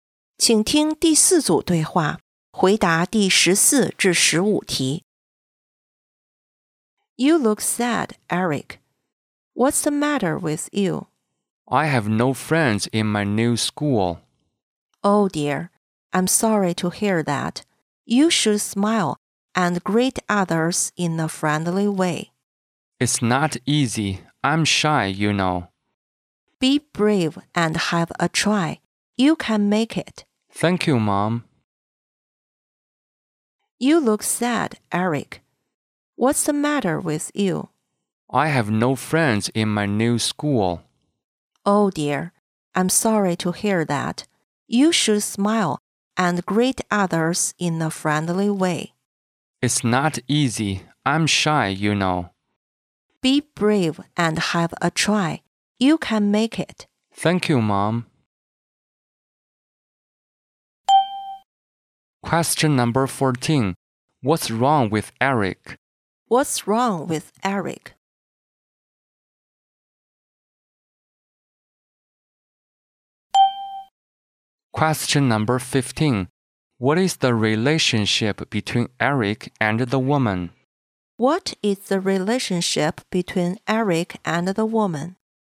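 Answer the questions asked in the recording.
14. He has no friends in his new school
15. Mother and son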